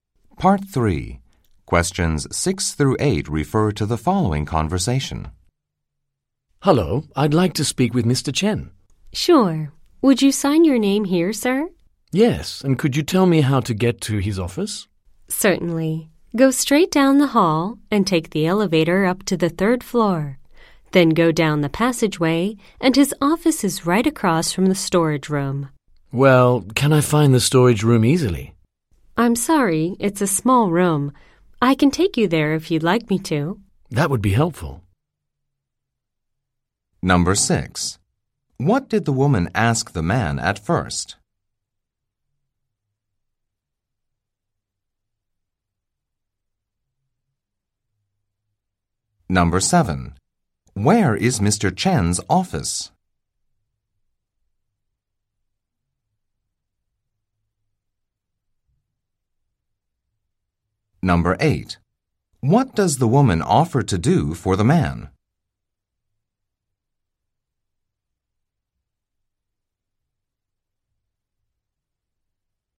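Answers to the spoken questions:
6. To sign his name
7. On the third floor, across from the storage room
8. Take him to the storage room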